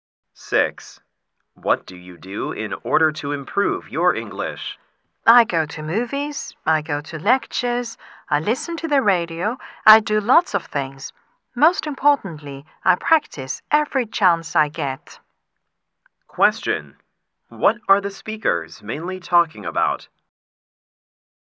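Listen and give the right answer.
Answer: Ways to improve English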